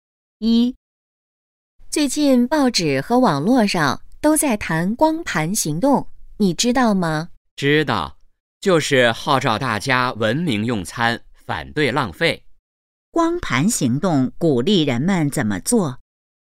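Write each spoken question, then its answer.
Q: 光盘行动鼓励人们怎么做?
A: 文明用餐,反对浪费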